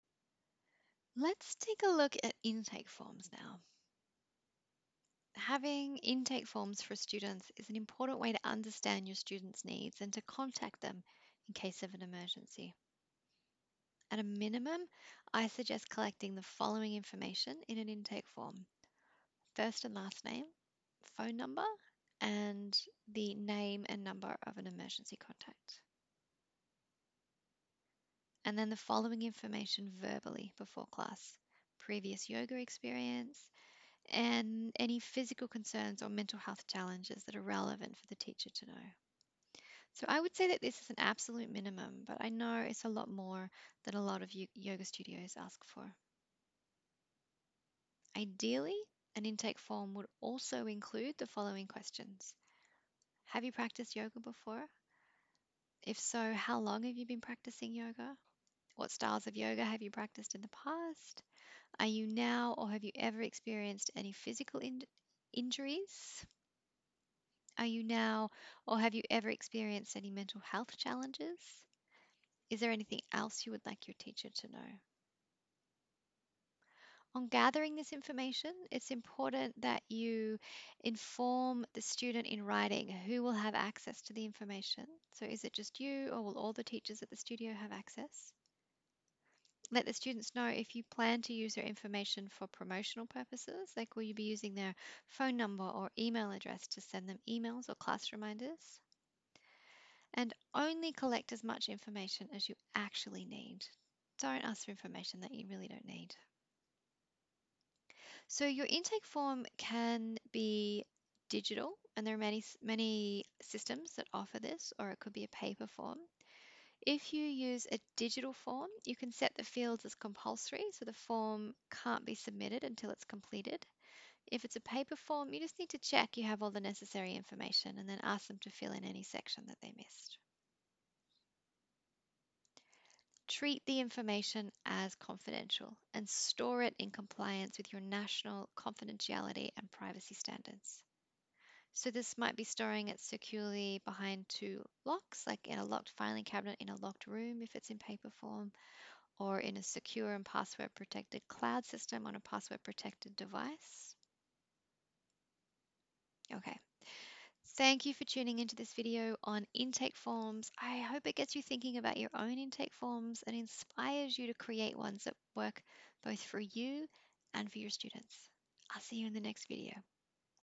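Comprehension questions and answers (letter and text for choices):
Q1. Why are intake forms important?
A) They are not important, especially if you have big classes and don't have time to consider your students individually.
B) To understand your students' needs and have a contact for them in case of emergency.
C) To understand every single health or emotional issue for the students for their entire life span, and so you should also request complete medical records before welcoming a student into your class.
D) None of the above.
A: B) To understand your students' needs and have a contact for them in case of emergency.

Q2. What would be appropriate questions to ask on an intake form?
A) Name and contact details.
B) Emergency contact details.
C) Any physical concerns of mental health challenges that are relevant for the teacher to know.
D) All of the above.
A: D) All of the above.

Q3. Your intake form could be:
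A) A secure online form that students complete at home before class.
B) A secure online form that students complete at the studio before the class begins.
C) A paper form that the student completes before class.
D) Any of the above.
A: D) Any of the above.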